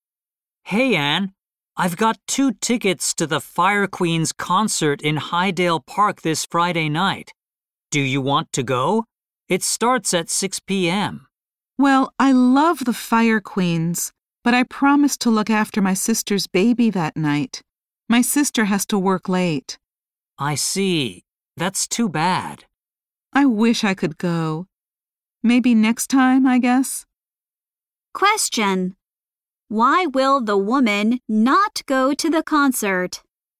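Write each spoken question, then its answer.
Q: Why will the woman not go to the concert?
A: She promised to look after her sister's baby.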